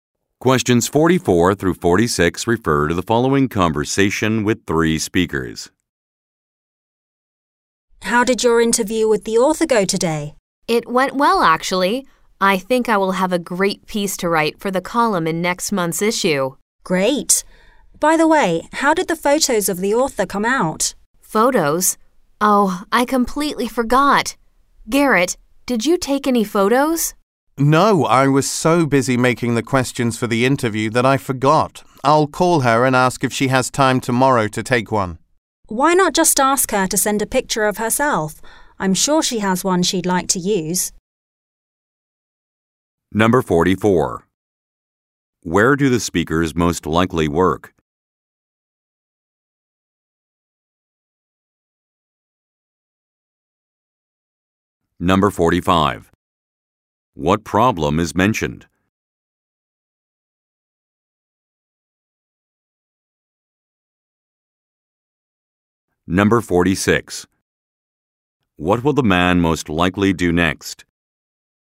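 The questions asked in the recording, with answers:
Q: Where do the speakers most likely work?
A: At a magazine

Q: What problem is mentioned?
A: No photos of the author were taken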